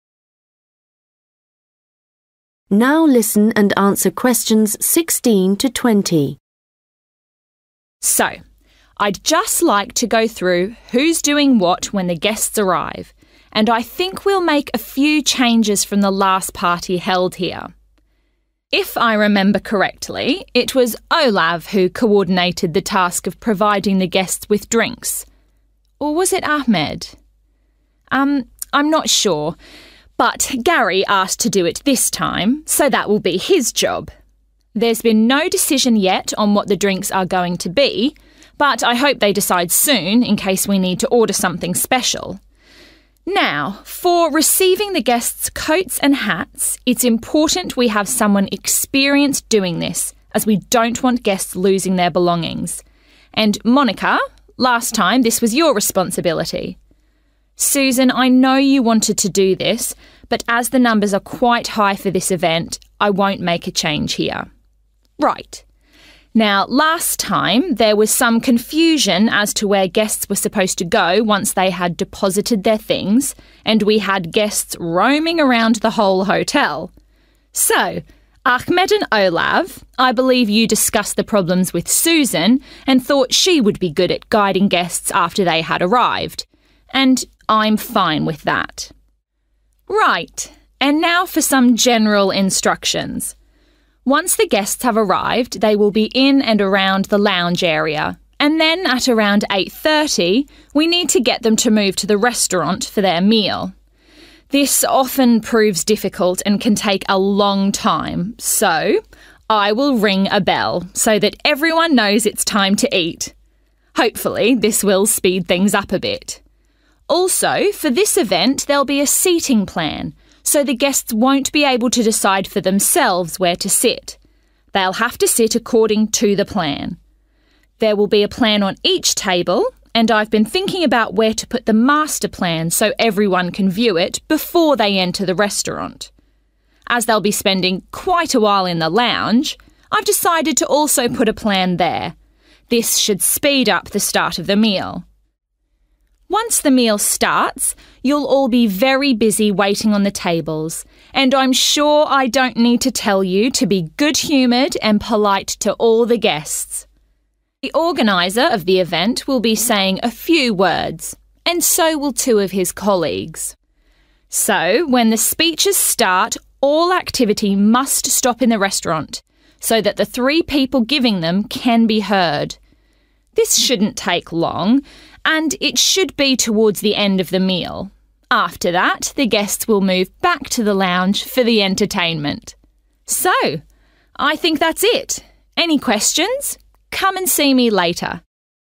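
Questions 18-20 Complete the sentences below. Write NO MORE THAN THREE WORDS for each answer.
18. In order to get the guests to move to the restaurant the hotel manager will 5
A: ring a bell

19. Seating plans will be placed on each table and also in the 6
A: lounge

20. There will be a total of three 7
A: speeches

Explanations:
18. then at around 8.30 we need to get them to move to the restaurant for their meal. This often proves difficult and can take a long time so I (= manager) will ring a bell so that everyone knows it's time to eat! (sau đó vào khoảng 8h30, chúng ta cần đưa họ đến nhà hàng để dùng bữa. Điều này thường khá khó khăn và có thể mất nhiều thời gian nên tôi sẽ rung chuông để mọi người biết đã đến giờ ăn!)
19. As they'll be spending quite a while in the lounge, I've decided to also put a plan there. (Vì họ sẽ dành khá nhiều thời gian trong phòng chờ, nên tôi quyết định cũng sẽ đặt một sơ đồ ở đó.)

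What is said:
So I'd just like to go through who's doing what when the guests arrive and I think we'll make a few changes from the last party held here. If I remember correctly, it was Olav who coordinated the task of providing the guests with drinks (= offer drinks to guests) or was it Ahmed? (nhưng lần này Gary muốn làm điều đó – vậy nên đó sẽ là công việc của anh ấy.) There's been no decision yet on what the drinks are going to be but I hope they decide soon in case we need to order something special. Now – for receiving the guests' coats and hats (= take guests' coats and hats) (về việc nhận áo khoác và mũ của khách), it's important we have someone experienced doing this as we don't want guests losing their belongings. (Q16) And Monica, last time this was your responsibility, Susan, I know you wanted to do this but as the numbers are quite high for this event I won't make a change here. 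(Q17) So Ahmed and Olav – I believe you discussed the problems with Susan and thought she would be good at guiding guests (= show guests where to go) after they had arrived – and I'm fine with that.
Questions
Write NO MORE THAN THREE WORDS for each answer.
General instructions In order to get the guests to move to the restaurant the hotel manager will 18
ring a bell
. Seating plans will be placed on each table and also in the 19
lounge
. There will be a total of three 20
speeches
Right – and now for some general instructions. Once the guests have arrived they will be in and around the lounge area and (Q18) then at around 8.30 we need to get them to move to the restaurant for their meal. This often proves difficult and can take a long time so I (= manager) will ring a bell so that everyone knows it's time to eat! Also – for this event there'll be a seating plan, so the guests won't be able to decide for themselves where to sit – they'll have to sit according to the plan. 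There'll be a plan on each table (= Seating plans will be placed on each table) (Sẽ có một sơ đồ ở mỗi bàn) and I've been thinking about where to put the master plan so everyone can view it before they enter the restaurant. (Q19) As they'll be spending quite a while in the lounge, I've decided to also put a plan there.
Once the meal starts, you'll all be very busy waiting on the tables and I'm sure I don't need to tell you to be good-humoured and polite to all the guests. (Q20) The organiser of the event will be saying a few words and so will two of his colleagues. So when the speeches/ speakers start all activity must stop in the restaurant so that the three people giving them can be heard. This shouldn't take long – and it should be towards the end of the meal. After that, the guests will move back to the lounge for the entertainment. So – I think that's it. Any questions – come and see me later.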